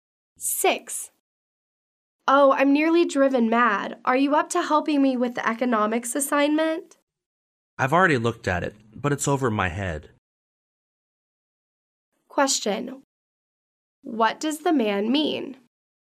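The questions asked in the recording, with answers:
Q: What does the man mean?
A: He can't help because the assignment is too hard for him.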